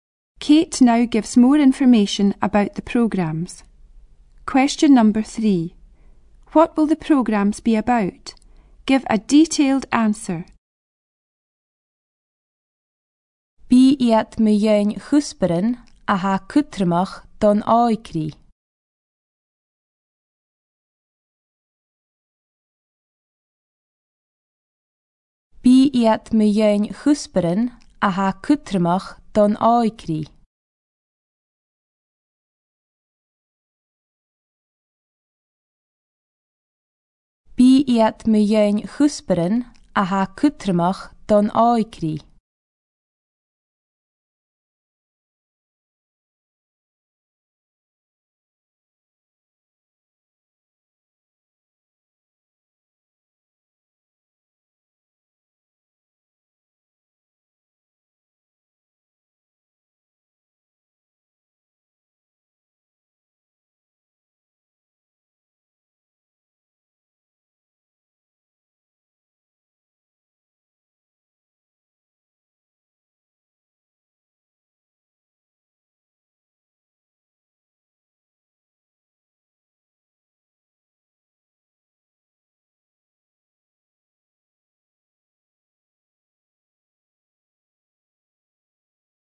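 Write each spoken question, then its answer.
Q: What will the programmes be about?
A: Topics that are important to young people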